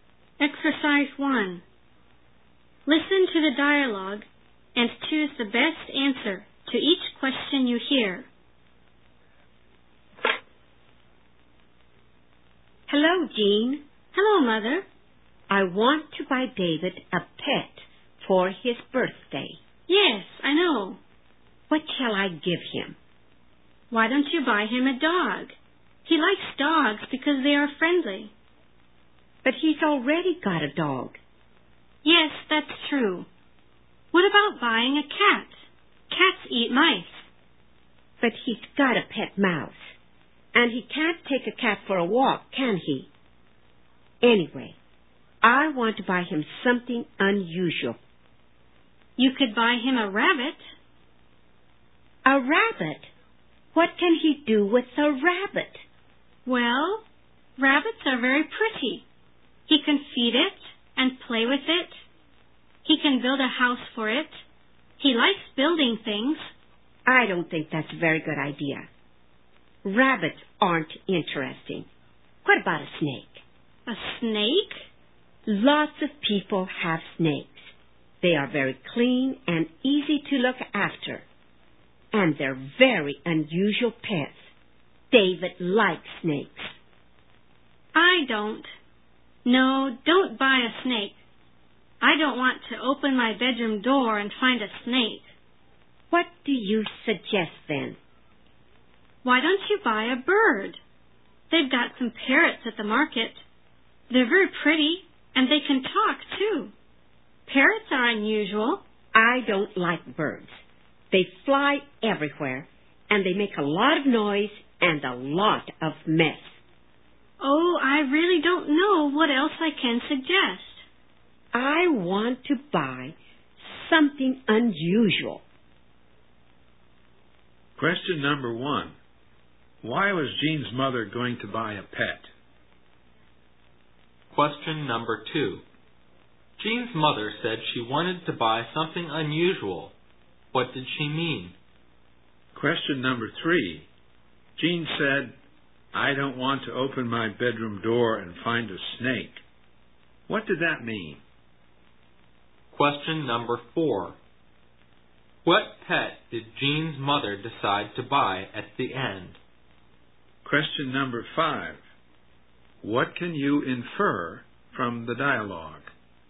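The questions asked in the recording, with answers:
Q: Why was Jean's mother going to buy a pet?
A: As a birthday present for David

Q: Jean's mother said she wanted to buy something unusual. What did she mean?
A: A pet that is not common, not like an ordinary pet

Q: Jean said, "I don't want to open my bedroom door and find a snake." What did that mean?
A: She didn't want a snake in the house; she doesn't like snakes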